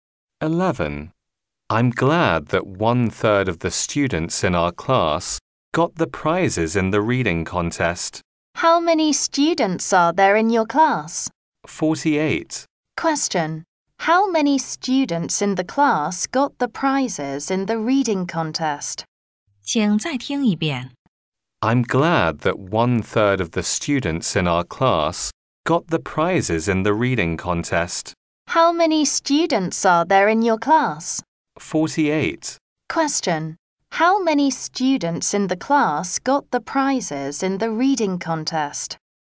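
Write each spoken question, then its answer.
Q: How many students in the class got the prizes in the reading contest?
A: 16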